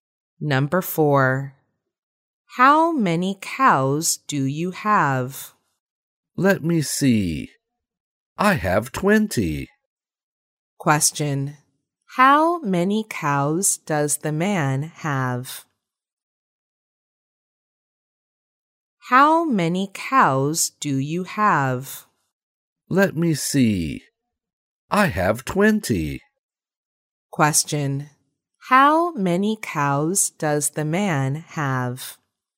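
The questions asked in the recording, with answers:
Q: How many cows does the man have?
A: 20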